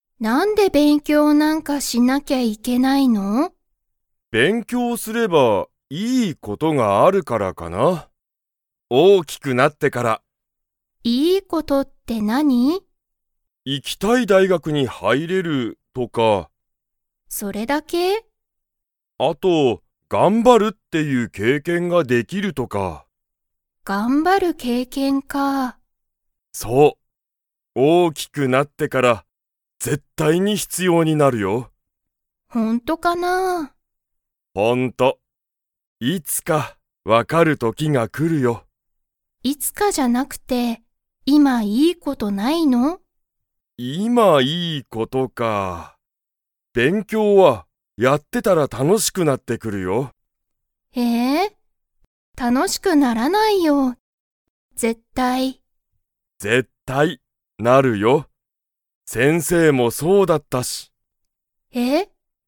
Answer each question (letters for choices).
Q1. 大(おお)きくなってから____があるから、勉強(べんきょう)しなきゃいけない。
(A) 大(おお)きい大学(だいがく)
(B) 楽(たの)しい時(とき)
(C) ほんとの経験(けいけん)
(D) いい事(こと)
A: D

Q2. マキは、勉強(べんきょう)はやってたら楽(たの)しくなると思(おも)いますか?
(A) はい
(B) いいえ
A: B

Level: Level 2